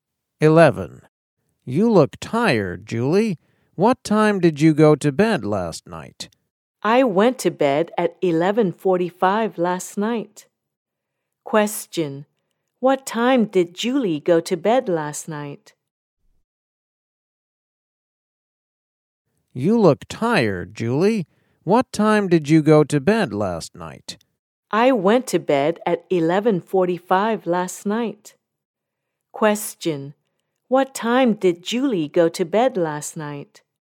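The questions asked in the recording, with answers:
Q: What time did Julie go to bed last night?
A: At 11:45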